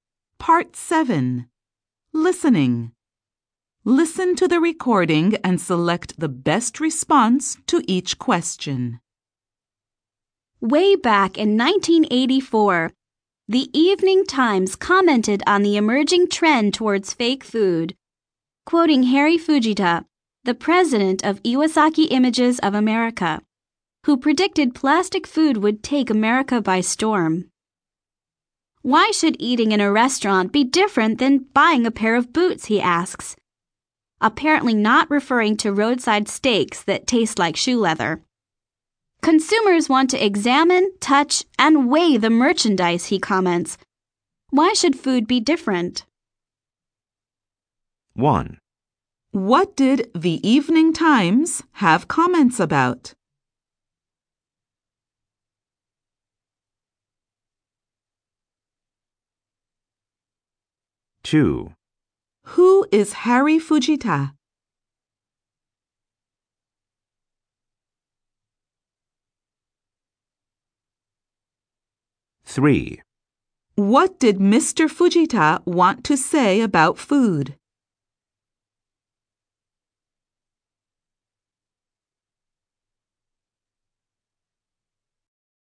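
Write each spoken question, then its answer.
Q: What did the Evening Times have comments about?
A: The emerging trend towards fake food

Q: Who is Harry Fujita?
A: The president of Iwasaki Images of America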